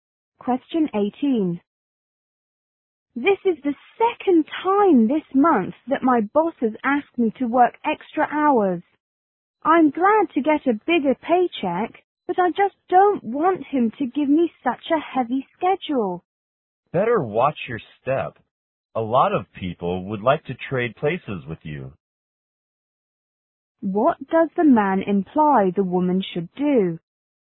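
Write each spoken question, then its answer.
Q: What does the man imply the woman should do?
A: Be careful not to complain; many would want her job.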